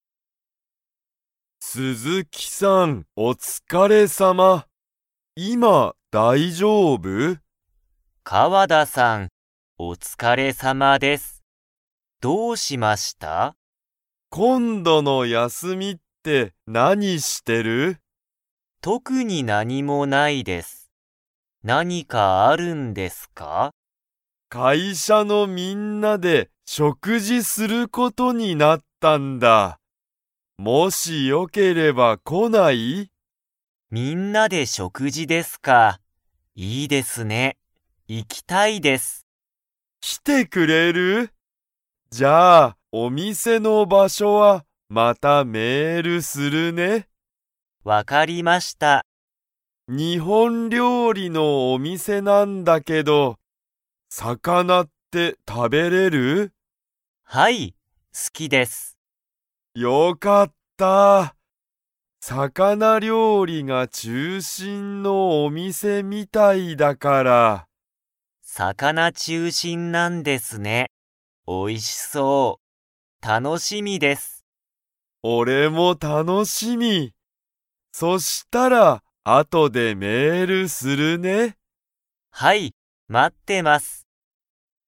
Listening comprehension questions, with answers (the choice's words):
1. 会社かいしゃのみんなで、何なにすることになりましたか?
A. 仕事しごと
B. 食事しょくじ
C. メール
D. 料理りょうり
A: 食事しょくじ

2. 鈴木すずきは魚さかなが 。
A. 好すき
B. 好すきじゃない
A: 好すき

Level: Level 3